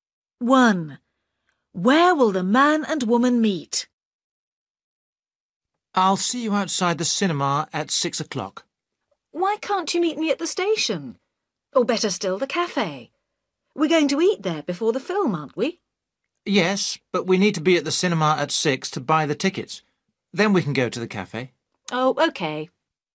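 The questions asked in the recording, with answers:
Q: Where will the man and woman meet?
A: outside the cinema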